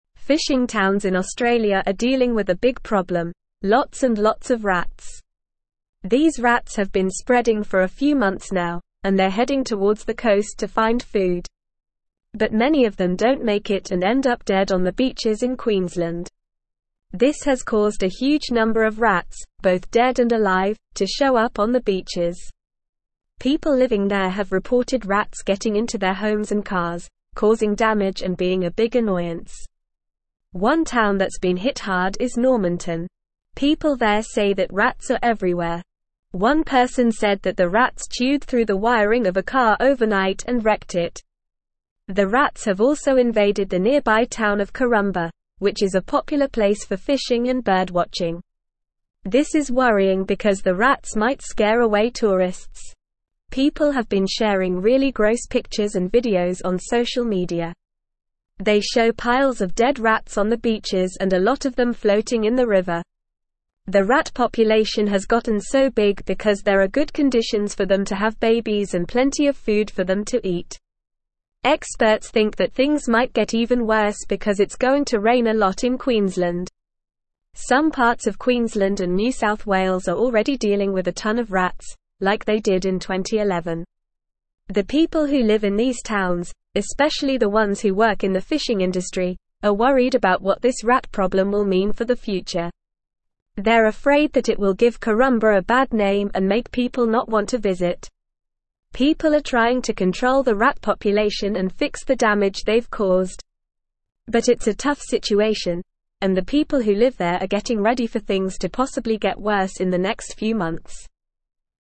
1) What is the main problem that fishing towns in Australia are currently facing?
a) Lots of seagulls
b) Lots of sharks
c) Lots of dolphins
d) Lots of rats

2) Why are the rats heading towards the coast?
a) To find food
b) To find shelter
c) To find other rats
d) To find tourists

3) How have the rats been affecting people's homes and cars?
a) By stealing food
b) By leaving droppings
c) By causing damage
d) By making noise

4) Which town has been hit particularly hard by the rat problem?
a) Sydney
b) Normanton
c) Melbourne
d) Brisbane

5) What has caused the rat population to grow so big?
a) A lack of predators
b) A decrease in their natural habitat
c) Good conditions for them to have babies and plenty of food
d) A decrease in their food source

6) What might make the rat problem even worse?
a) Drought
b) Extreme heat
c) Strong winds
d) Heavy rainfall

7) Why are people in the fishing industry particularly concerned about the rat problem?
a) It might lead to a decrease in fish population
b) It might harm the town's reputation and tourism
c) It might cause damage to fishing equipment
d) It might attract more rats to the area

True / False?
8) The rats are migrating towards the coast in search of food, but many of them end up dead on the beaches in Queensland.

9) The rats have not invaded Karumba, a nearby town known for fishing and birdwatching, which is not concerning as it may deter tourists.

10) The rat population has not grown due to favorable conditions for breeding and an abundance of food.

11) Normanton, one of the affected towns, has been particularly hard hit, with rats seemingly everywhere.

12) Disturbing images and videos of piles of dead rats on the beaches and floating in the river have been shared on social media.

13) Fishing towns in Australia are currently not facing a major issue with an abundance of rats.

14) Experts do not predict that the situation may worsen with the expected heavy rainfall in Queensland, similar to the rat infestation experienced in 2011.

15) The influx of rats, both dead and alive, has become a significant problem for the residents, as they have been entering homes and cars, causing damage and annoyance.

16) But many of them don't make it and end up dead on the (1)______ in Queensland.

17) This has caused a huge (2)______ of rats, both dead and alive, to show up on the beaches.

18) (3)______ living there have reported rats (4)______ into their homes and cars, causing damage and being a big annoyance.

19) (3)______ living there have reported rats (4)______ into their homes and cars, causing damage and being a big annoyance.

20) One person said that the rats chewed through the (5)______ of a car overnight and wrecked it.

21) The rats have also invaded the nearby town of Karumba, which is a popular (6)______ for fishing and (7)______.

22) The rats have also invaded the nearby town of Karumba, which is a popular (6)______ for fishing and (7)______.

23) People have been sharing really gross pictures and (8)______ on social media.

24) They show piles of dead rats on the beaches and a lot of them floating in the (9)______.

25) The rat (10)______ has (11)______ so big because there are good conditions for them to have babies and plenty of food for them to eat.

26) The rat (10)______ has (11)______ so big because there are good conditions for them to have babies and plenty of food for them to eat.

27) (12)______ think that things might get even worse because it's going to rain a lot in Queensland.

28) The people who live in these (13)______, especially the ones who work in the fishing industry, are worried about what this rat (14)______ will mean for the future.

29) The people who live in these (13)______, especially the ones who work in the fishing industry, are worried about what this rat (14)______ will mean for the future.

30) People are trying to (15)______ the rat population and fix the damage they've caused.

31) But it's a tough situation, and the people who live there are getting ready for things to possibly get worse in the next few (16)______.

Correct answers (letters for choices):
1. d
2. a
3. c
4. b
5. c
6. d
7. b
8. True
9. False
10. False
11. True
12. True
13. False
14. False
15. True
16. beaches
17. number
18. People
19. getting
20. wiring
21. place
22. birdwatching
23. videos
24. river
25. population
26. gotten
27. Experts
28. towns
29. problem
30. control
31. months

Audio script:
Fishing towns in Australia are dealing with a big problem: lots and lots of rats. These rats have been spreading for a few months now, and they're heading towards the coast to find food. But many of them don't make it and end up dead on the beaches in Queensland. This has caused a huge number of rats, both dead and alive, to show up on the beaches. People living there have reported rats getting into their homes and cars, causing damage and being a big annoyance.
One town that's been hit hard is Normanton. People there say that rats are everywhere. One person said that the rats chewed through the wiring of a car overnight and wrecked it. The rats have also invaded the nearby town of Karumba, which is a popular place for fishing and birdwatching. This is worrying because the rats might scare away tourists.
People have been sharing really gross pictures and videos on social media. They show piles of dead rats on the beaches and a lot of them floating in the river. The rat population has gotten so big because there are good conditions for them to have babies and plenty of food for them to eat. Experts think that things might get even worse because it's going to rain a lot in Queensland. Some parts of Queensland and New South Wales are already dealing with a ton of rats, like they did in 2011.
The people who live in these towns, especially the ones who work in the fishing industry, are worried about what this rat problem will mean for the future. They're afraid that it will give Karumba a bad name and make people not want to visit. People are trying to control the rat population and fix the damage they've caused. But it's a tough situation, and the people who live there are getting ready for things to possibly get worse in the next few months.

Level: Level 3